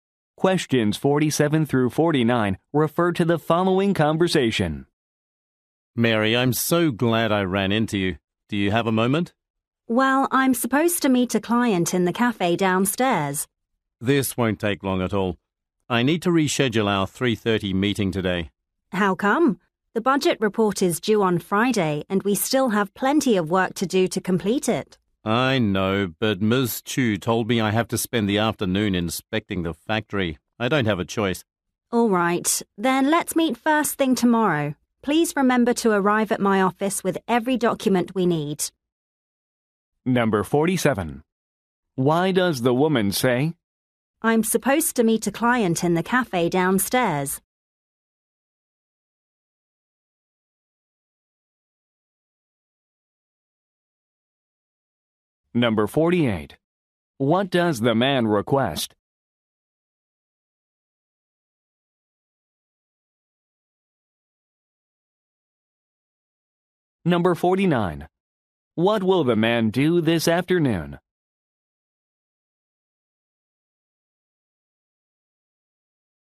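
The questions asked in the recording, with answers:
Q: What does the man request?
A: To reschedule their meeting

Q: What will the man do this afternoon?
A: Inspect the factory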